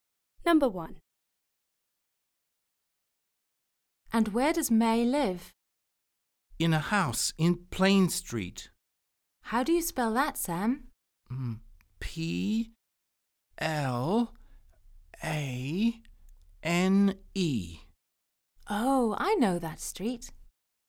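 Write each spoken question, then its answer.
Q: And where does May live?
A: Plane Street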